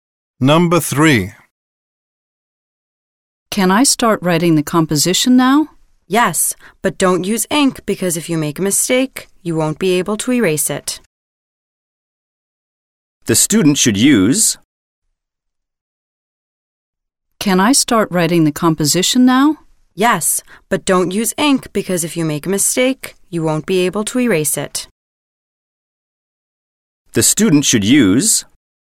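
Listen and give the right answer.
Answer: A pencil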